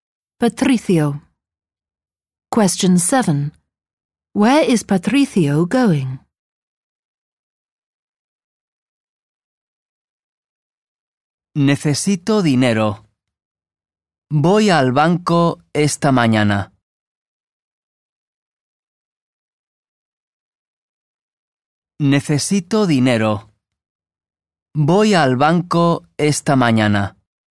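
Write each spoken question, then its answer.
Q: Where is Patricio going?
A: The bank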